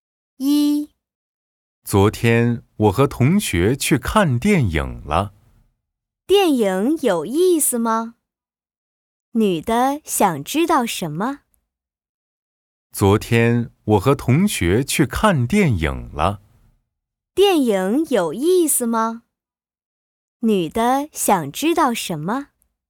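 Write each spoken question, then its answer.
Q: 电影有意思吗?女的想知道什么?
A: 电影有没有意思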